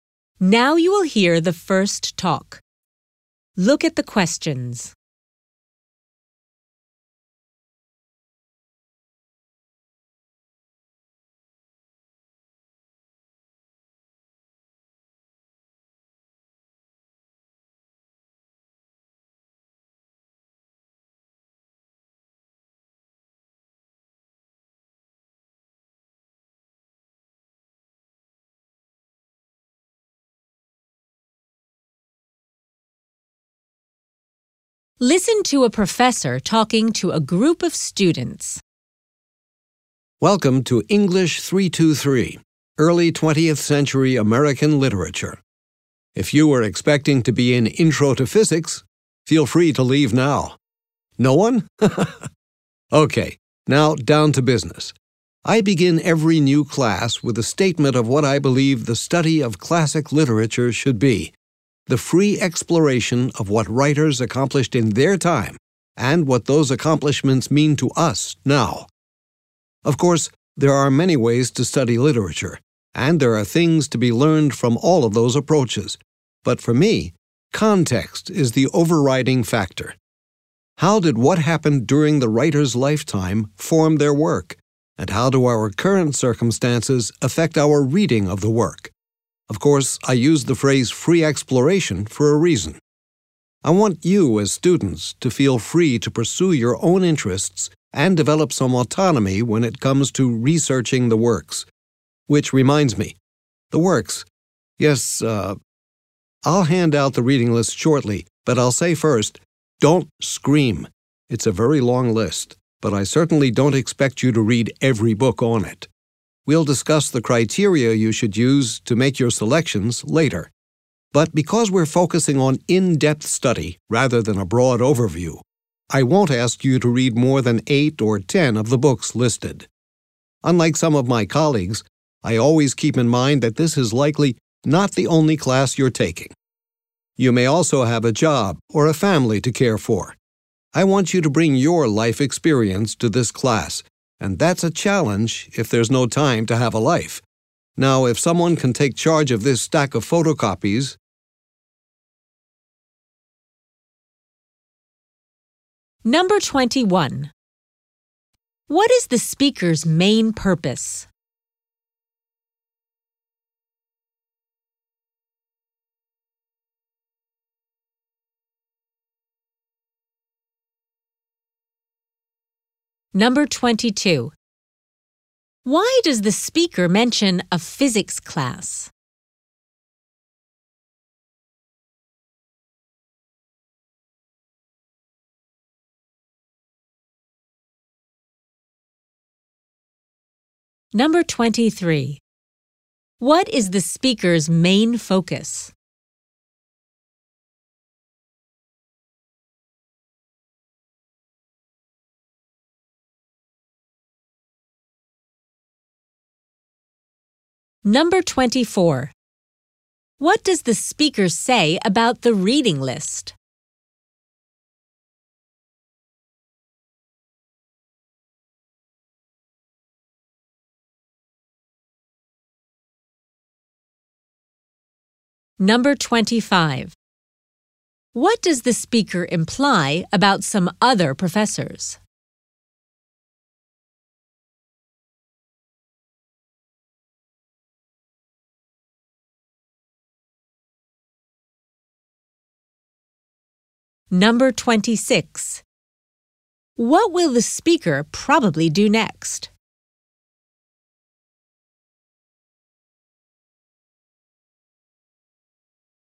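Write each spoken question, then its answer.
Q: What is the speaker's main purpose?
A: To introduce the course and his approach to studying literature

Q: Why does the speaker mention a physics class?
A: To let students in the wrong class know they can leave

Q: What is the speaker's main focus?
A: The context of literary works

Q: What does the speaker say about the reading list?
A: It is long, but students only need to read 8 or 10 books

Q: What does the speaker imply about some other professors?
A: They forget students have other classes and assign too much work

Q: What will the speaker probably do next?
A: Hand out the reading list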